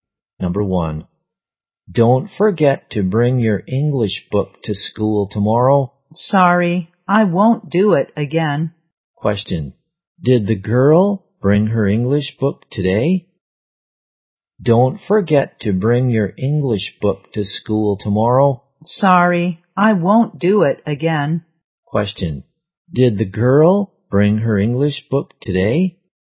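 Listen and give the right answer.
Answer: No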